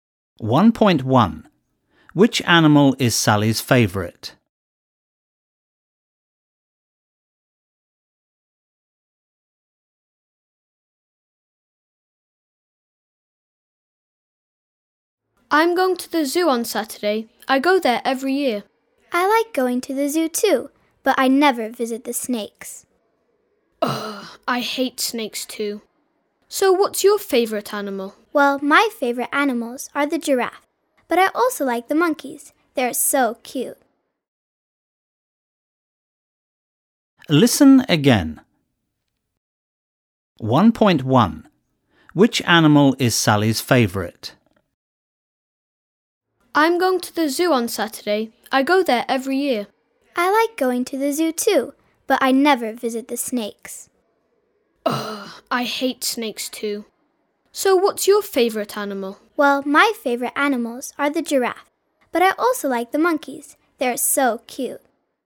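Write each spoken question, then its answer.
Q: Which animal is Sally's favourite?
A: The giraffe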